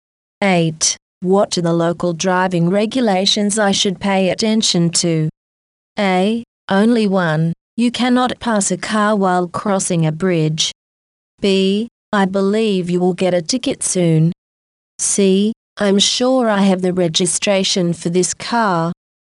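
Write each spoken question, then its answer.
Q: What are the local driving regulations I should pay attention to?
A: A: Only one, you cannot pass a car while crossing a bridge.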